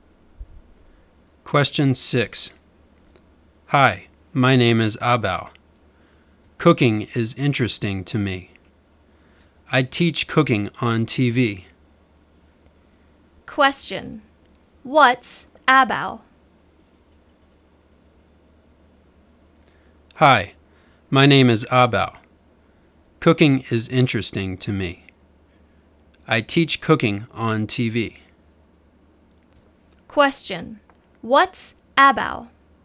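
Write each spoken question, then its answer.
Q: What's Abao?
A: A cooking teacher on TV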